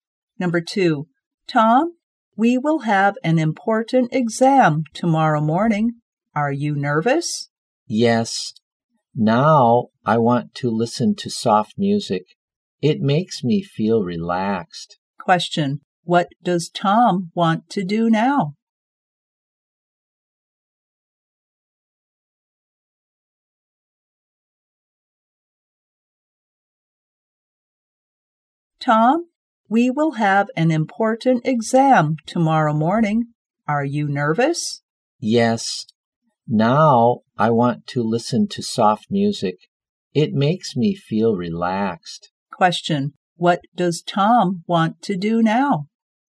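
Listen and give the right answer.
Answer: Listen to soft music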